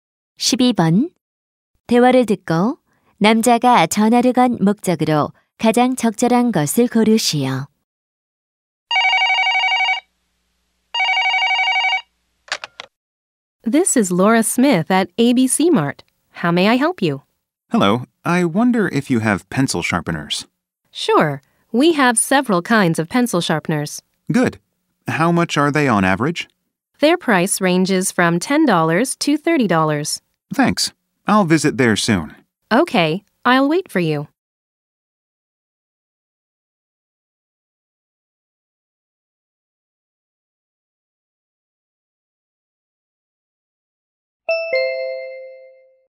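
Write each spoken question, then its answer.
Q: 대화를 듣고 남자가 전화를 건 목적으로 가장 적절한 것을 고르시오.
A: 연필깎이가 있는지 문의하려고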